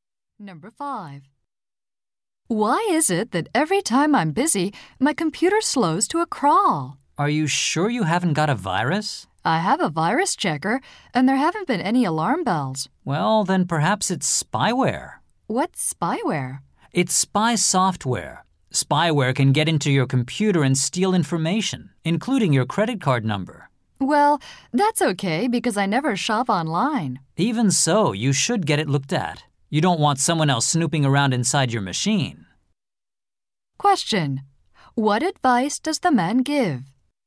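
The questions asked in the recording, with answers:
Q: What advice does the man give?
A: Have her computer checked for spyware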